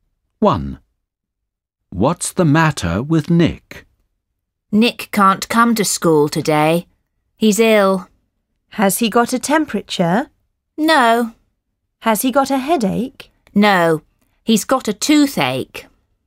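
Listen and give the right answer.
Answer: He's got a toothache.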